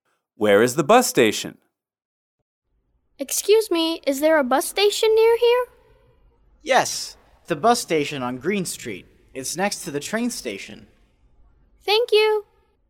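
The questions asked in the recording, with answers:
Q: Where is the bus station?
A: On Green Street, next to the train station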